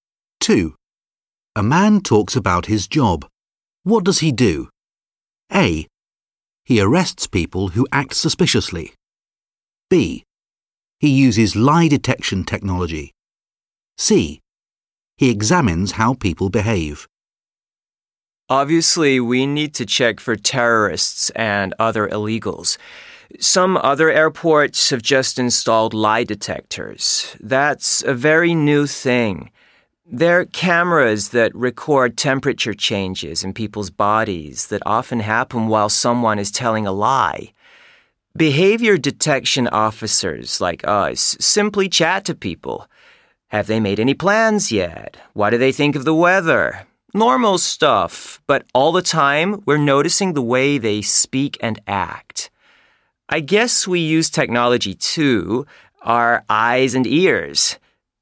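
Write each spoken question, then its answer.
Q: What does he do?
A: C: He examines how people behave.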